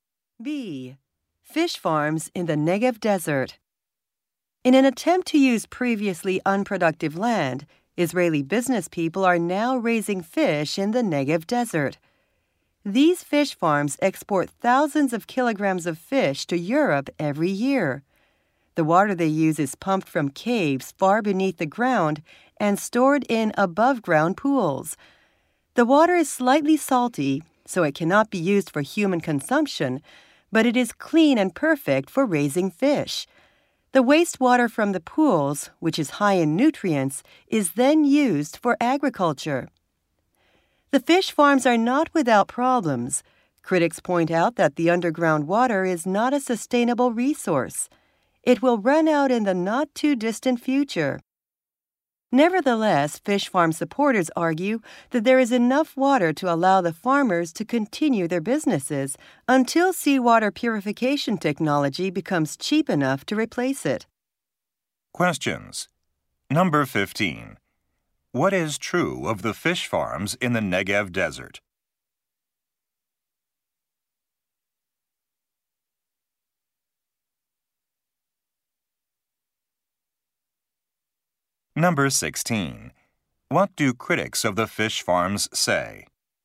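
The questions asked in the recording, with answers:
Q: What is true of the fish farms in the Negev Desert?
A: They use slightly salty underground water, and the wastewater is then used for agriculture.

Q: What do critics of the fish farms say?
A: The underground water is not sustainable and will soon run out.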